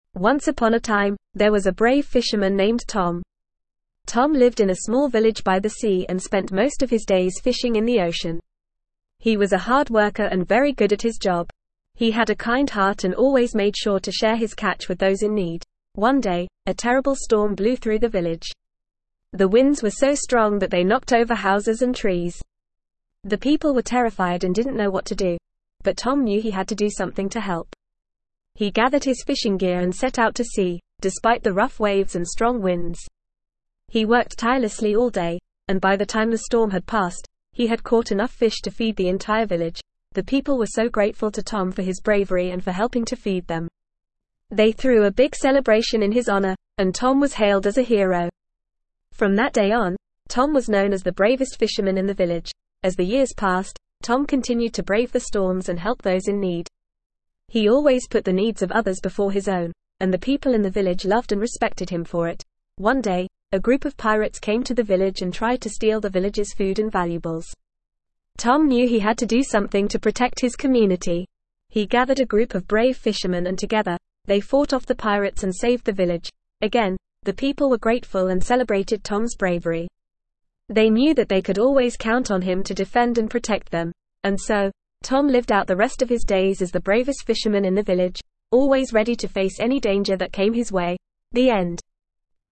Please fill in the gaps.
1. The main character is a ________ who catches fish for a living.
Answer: fisherman

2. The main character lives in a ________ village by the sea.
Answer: small

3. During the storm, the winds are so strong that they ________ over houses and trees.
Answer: knock

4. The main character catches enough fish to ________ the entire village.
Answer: feed

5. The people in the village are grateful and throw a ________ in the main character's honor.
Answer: celebration

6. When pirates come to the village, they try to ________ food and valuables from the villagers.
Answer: steal

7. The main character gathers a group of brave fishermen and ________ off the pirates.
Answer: fights

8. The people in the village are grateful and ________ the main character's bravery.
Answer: celebrate

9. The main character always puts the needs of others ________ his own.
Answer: before

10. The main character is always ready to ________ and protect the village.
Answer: defend

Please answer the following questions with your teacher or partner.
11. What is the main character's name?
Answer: Tom

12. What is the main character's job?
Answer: Fisherman

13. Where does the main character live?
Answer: In a small village by the sea

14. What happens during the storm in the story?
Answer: The winds are strong and knock over houses and trees.

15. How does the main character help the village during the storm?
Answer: He catches enough fish to feed the entire village.

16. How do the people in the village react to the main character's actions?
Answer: They are grateful and throw a celebration in his honor.

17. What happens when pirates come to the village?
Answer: They try to steal food and valuables from the villagers.

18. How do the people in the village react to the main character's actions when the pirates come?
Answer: They are grateful and celebrate his bravery.

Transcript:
Once upon a time, there was a brave fisherman named Tom. Tom lived in a small village by the sea and spent most of his days fishing in the ocean. He was a hard worker and very good at his job. He had a kind heart and always made sure to share his catch with those in need.
One day, a terrible storm blew through the village. The winds were so strong that they knocked over houses and trees. The people were terrified and didn't know what to do.
But Tom knew he had to do something to help. He gathered his fishing gear and set out to sea, despite the rough waves and strong winds. He worked tirelessly all day, and by the time the storm had passed, he had caught enough fish to feed the entire village.
The people were so grateful to Tom for his bravery and for helping to feed them. They threw a big celebration in his honor, and Tom was hailed as a hero. From that day on, Tom was known as the bravest fisherman in the village.
As the years passed, Tom continued to brave the storms and help those in need. He always put the needs of others before his own, and the people in the village loved and respected him for it.
One day, a group of pirates came to the village and tried to steal the villagers' food and valuables. He gathered a group of brave fishermen and together, they fought off the pirates and saved the village.
Again, the people were grateful and celebrated Tom's bravery. They knew that they could always count on him to defend and protect them.
And so, Tom lived out the rest of his days as the bravest fisherman in the village, always ready to face any danger that came his way.
The end.

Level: Level 2